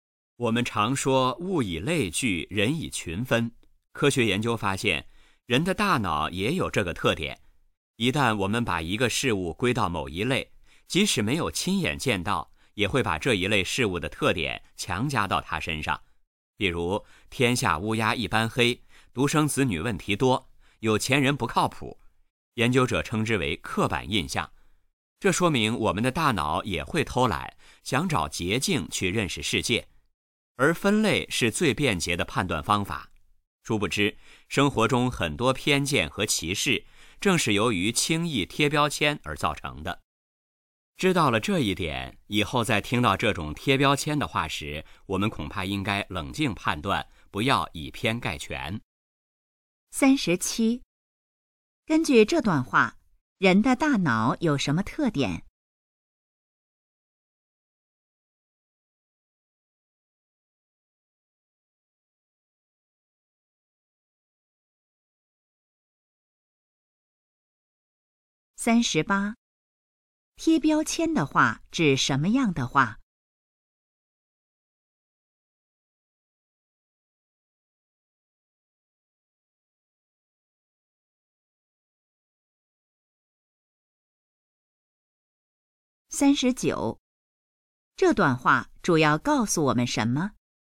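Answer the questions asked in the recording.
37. 会偷懒,喜欢分类
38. 以偏概全的刻板印象的话
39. 不要轻易贴标签,以偏概全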